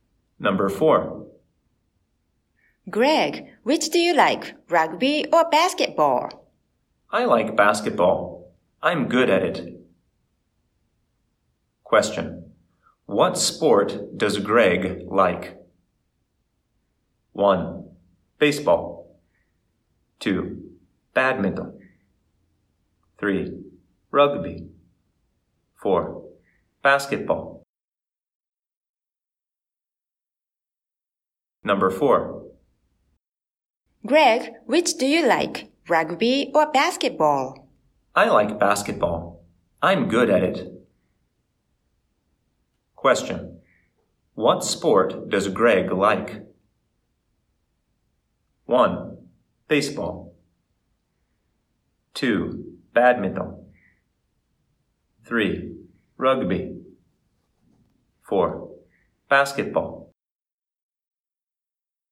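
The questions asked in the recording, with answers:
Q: What sport does Greg like?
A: 4: Basketball.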